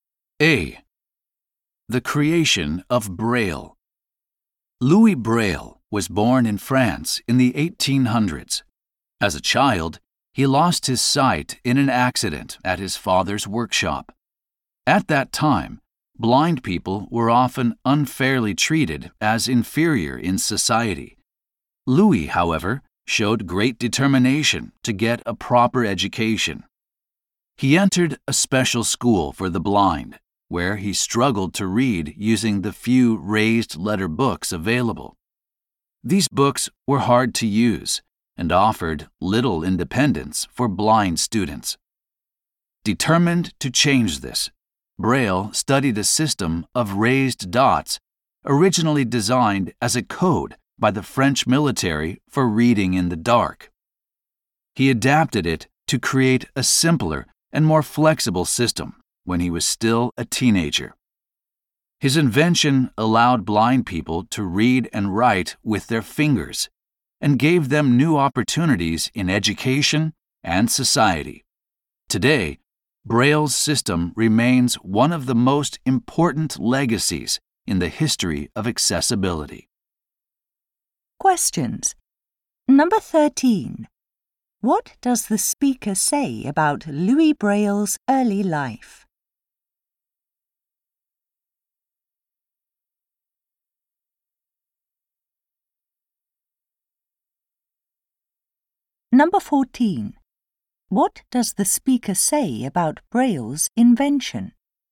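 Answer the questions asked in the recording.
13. He lost his sight in an accident at his father's workshop as a child
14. He adapted a French military code of raised dots as a teenager, letting blind people read and write with their fingers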